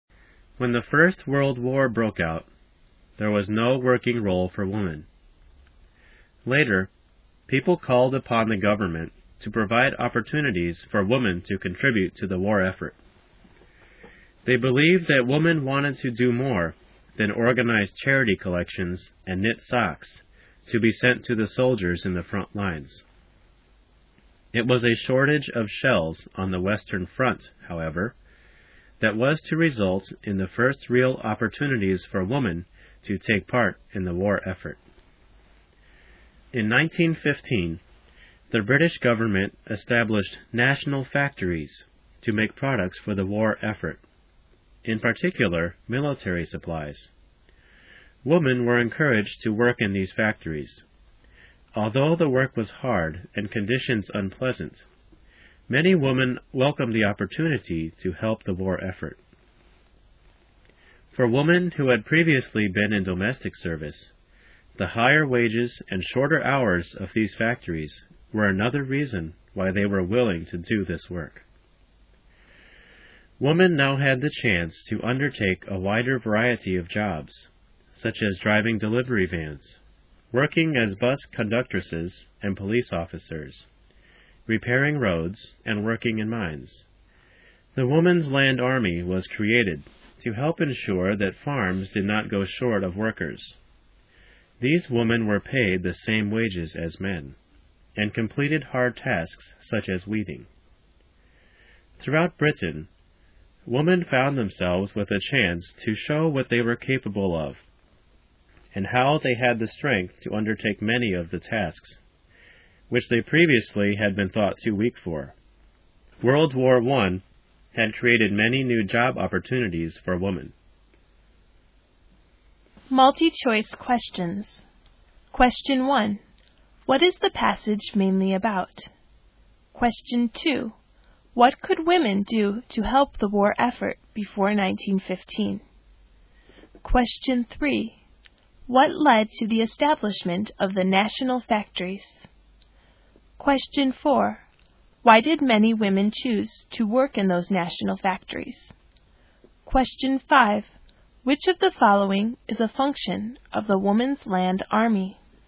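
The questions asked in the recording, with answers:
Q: What is the passage mainly about?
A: Women's new job opportunities during World War I

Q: What could women do to help the war effort before 1915?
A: Organize charity collections and knit socks for soldiers

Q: What led to the establishment of the national factories?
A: A shortage of shells on the Western Front

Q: Why did many women choose to work in those national factories?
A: To help the war effort, and for higher wages and shorter hours

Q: Which of the following is a function of the Woman's Land Army?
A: Making sure farms did not go short of workers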